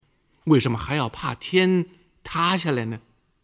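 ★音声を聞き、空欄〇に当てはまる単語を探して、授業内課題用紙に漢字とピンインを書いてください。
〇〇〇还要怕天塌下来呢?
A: 为什么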